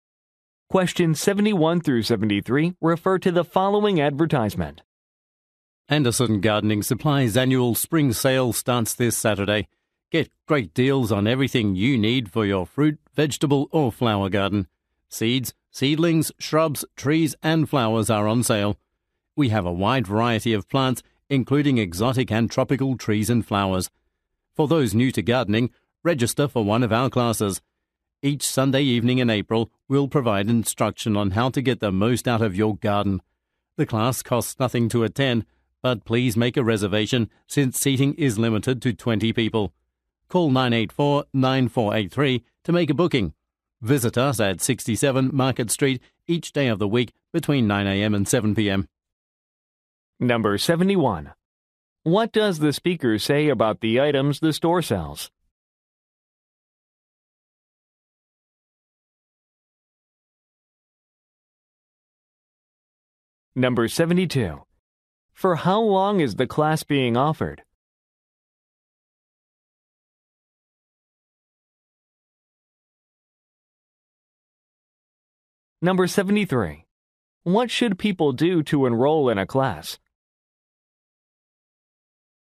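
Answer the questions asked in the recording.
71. They are on sale, including exotic and tropical plants
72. For one month (each Sunday in April)
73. Make a reservation by phone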